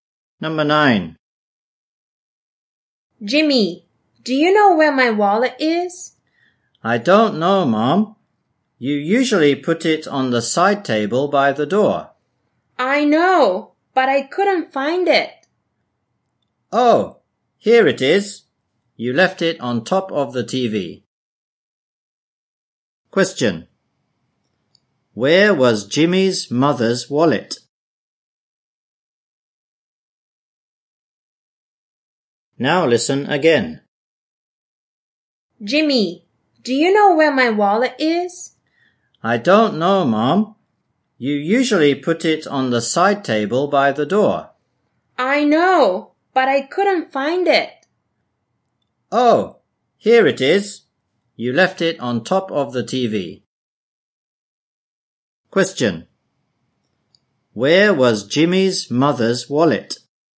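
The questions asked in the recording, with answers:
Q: Where was Jimmy's mother's wallet?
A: On top of the TV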